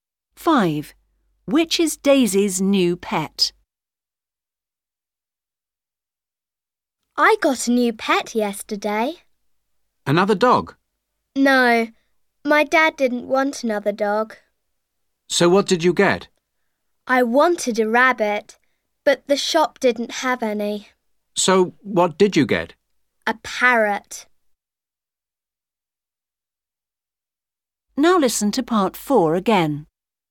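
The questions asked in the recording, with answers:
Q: Which is Daisy's new pet?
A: A parrot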